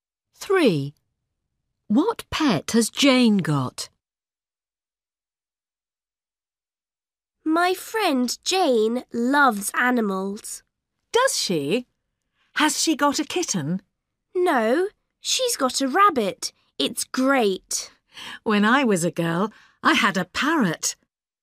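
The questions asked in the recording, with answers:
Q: What pet has Jane got?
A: a rabbit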